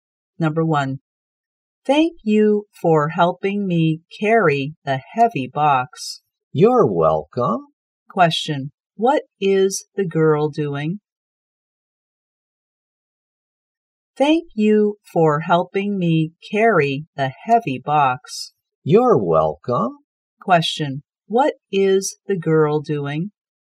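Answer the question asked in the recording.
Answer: Carrying a heavy box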